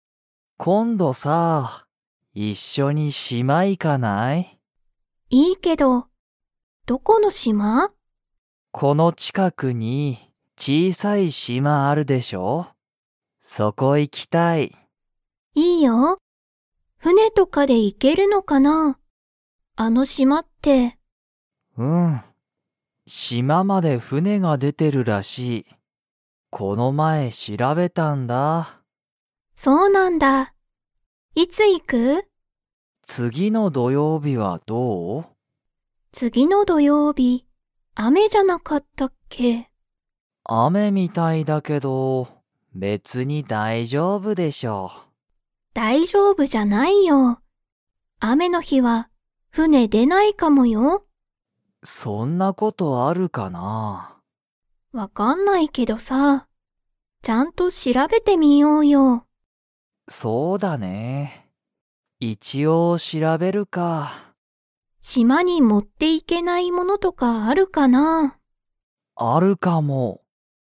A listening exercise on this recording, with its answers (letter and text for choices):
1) この近ちかくに 島しまがある。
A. 新あたらしい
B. 古ふるい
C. 大おおきい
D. 小ちいさい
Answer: D. 小ちいさい

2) 次つぎの土曜日どようびは、雨あめになりそうですか?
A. はい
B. いいえ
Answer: A. はい

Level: Level 3